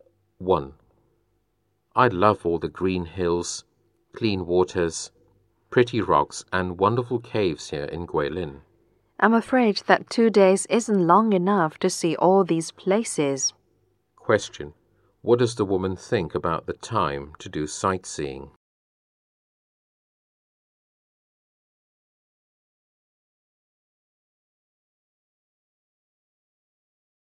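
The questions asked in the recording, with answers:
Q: What does the woman think about the time to do sightseeing?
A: Two days isn't long enough to see all the places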